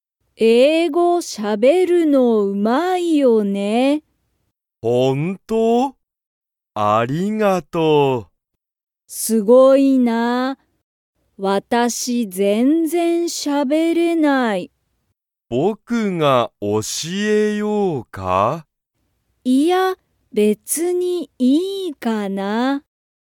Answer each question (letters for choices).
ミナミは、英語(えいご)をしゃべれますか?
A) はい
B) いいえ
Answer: B

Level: Level 1